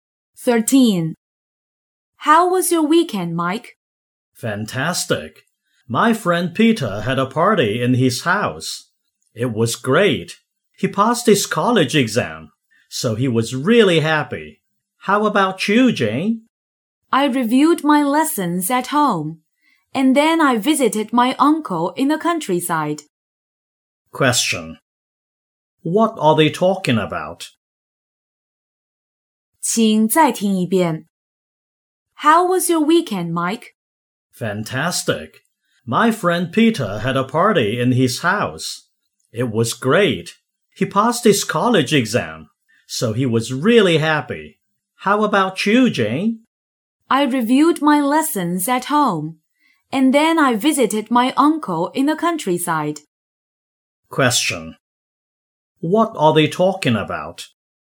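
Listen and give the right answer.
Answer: What they did last weekend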